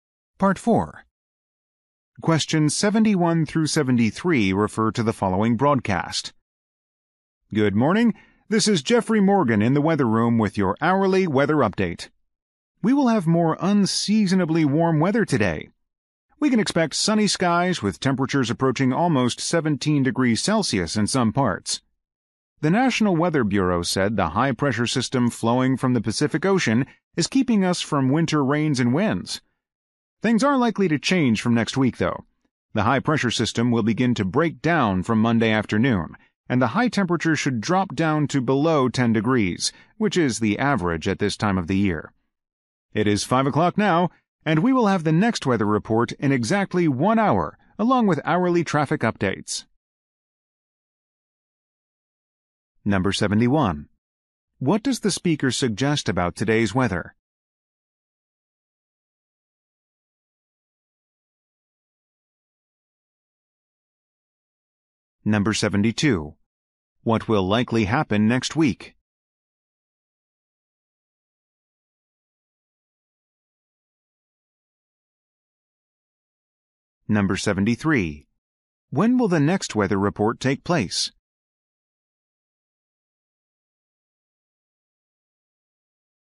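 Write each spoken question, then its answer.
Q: What does the speaker suggest about today's weather?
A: It will be unusually warm and sunny.

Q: What will likely happen next week?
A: Temperatures will drop to below 10 degrees.

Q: When will the next weather report take place?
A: In one hour, at 6 o'clock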